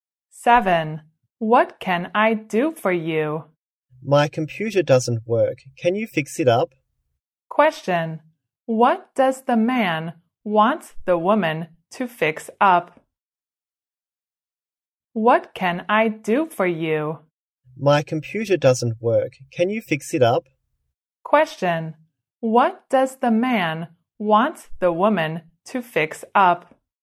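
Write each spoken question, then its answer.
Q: What does the man want the woman to fix up?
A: His computer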